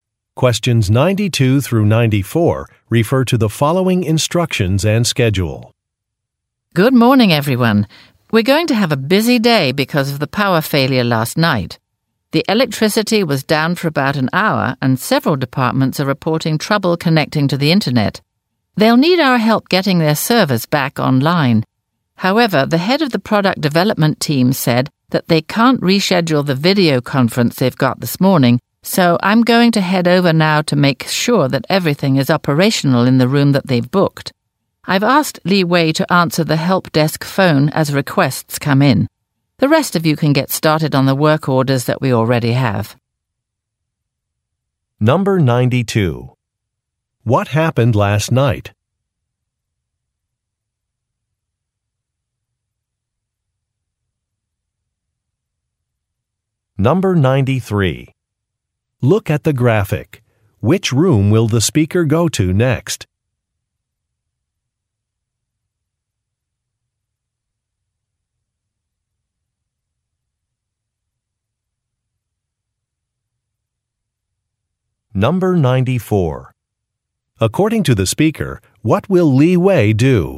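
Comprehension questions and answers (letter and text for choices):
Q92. What happened last night?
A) Some servers were delivered.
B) The electricity went out.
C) A Web site was launched.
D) Some keys were lost.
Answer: B) The electricity went out.

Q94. According to the speaker, what will Li Wei do?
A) Lead a repair crew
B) Test out some products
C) Install some software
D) Answer a telephone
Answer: D) Answer a telephone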